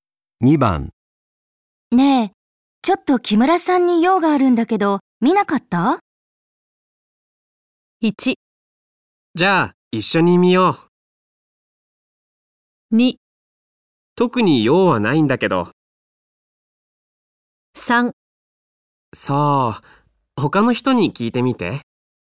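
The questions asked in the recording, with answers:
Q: ねえ、ちょっと木村さんに用があるんだけど、見なかった?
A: 3: そう、他の人に聞いてみて。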